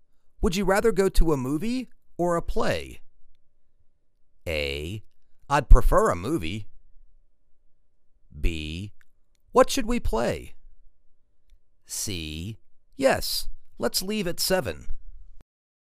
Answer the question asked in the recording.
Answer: I'd prefer a movie.